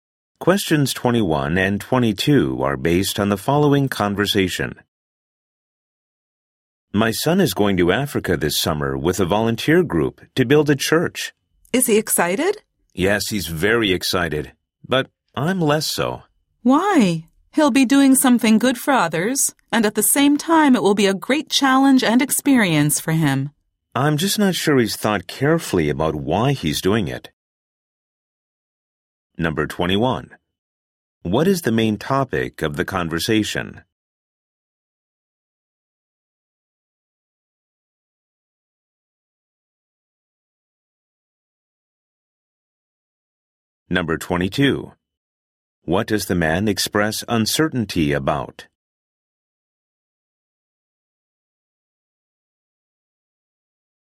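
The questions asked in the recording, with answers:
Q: What is the main topic of the conversation?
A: The man's son volunteering in Africa

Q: What does the man express uncertainty about?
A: Whether his son has thought carefully about why he's going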